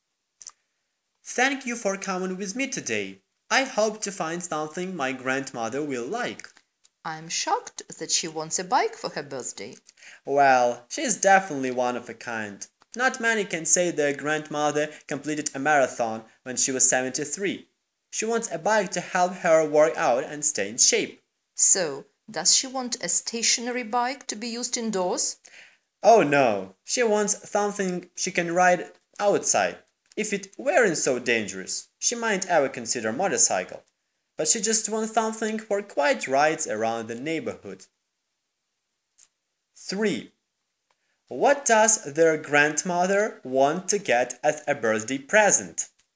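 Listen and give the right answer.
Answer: A bike to ride outside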